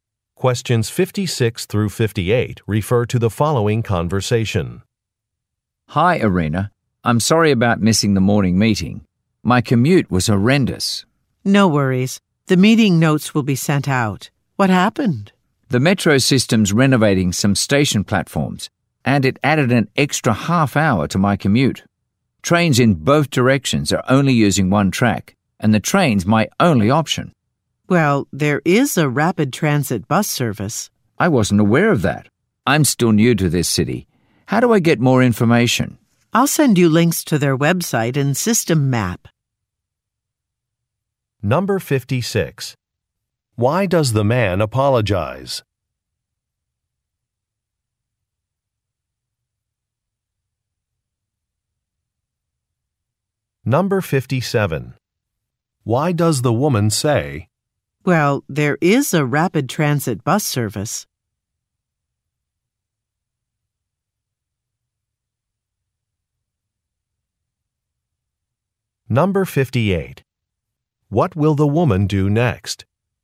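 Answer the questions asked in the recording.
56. He missed the morning meeting
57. To suggest another way to commute
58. Send him links to the bus website and map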